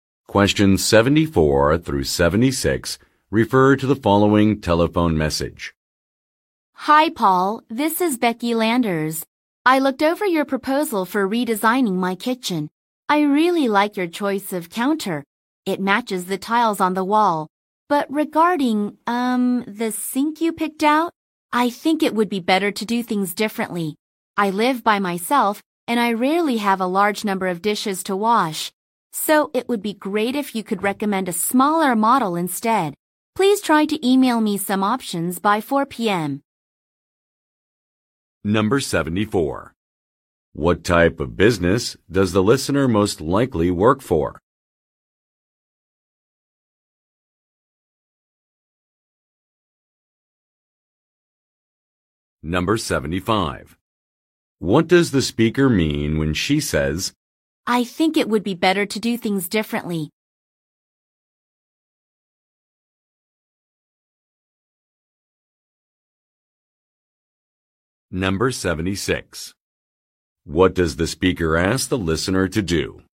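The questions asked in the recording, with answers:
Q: What type of business does the listener most likely work for?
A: A kitchen remodeling / interior design company

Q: What does the speaker mean when she says, I think it would be better to do things differently?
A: She wants a different, smaller sink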